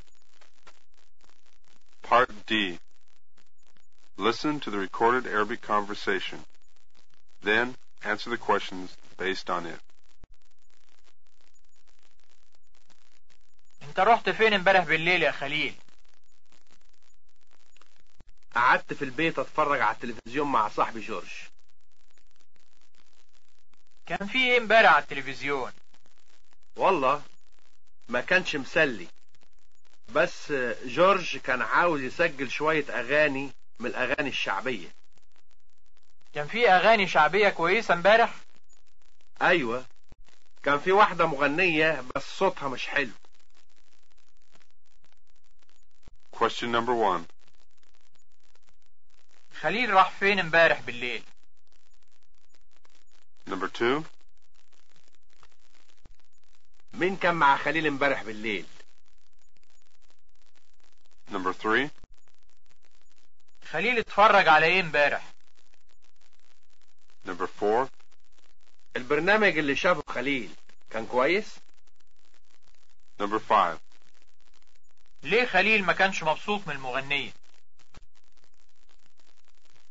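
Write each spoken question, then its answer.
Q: خليل راح فين امبارح بالليل؟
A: قعد في البيت

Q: مين كان مع خليل امبارح بالليل؟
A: صاحبه جورج

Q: خليل اتفرج على ايه امبارح؟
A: التلفزيون

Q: البرنامج اللي شافه خليل كان كويس؟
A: لا، ما كانش مسلي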